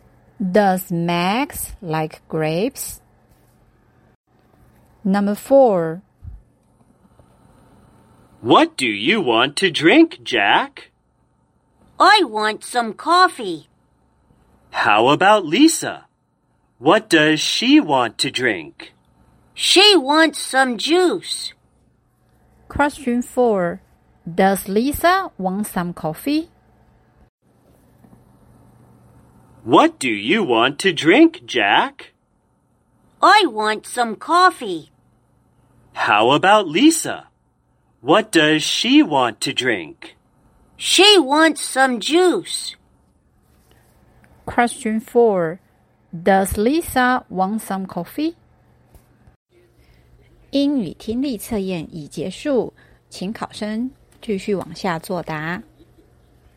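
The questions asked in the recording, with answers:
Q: Does Lisa want some coffee?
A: No, she doesn't. She wants some juice.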